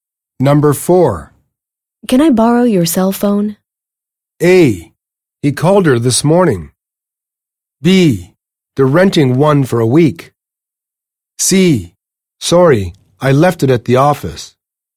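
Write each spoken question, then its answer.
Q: Can I borrow your cell phone?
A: C: Sorry, I left it at the office.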